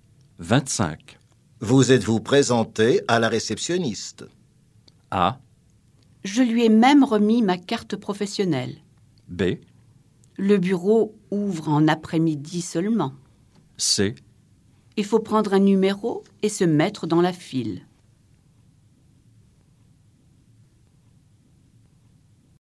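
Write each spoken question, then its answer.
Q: Vous êtes-vous présenté à la réceptionniste?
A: A: Je lui ai même remis ma carte professionnelle.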